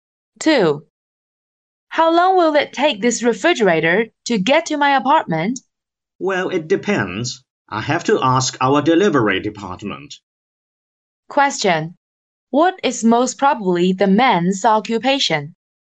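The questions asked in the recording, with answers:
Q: What is most probably the man's occupation?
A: A salesperson in an appliance store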